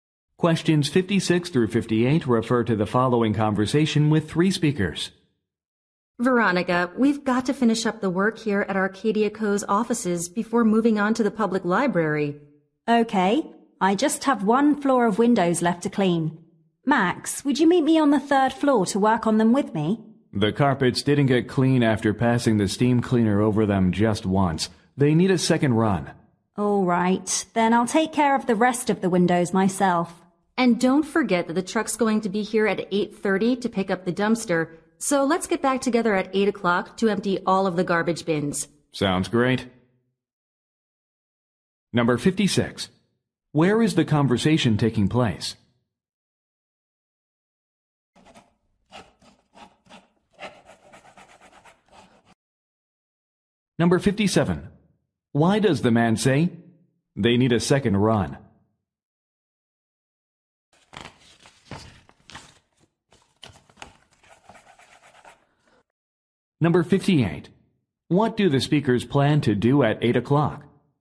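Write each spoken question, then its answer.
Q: Where is the conversation taking place?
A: At Arcadia Co.'s offices

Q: Why does the man say they need a second run?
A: The carpets didn't get clean

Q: What do the speakers plan to do at 8 o'clock?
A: Empty all the garbage bins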